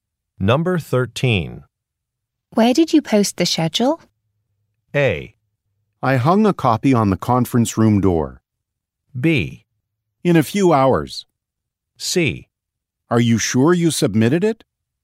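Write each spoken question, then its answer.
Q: Where did you post the schedule?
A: A: I hung a copy on the conference room door.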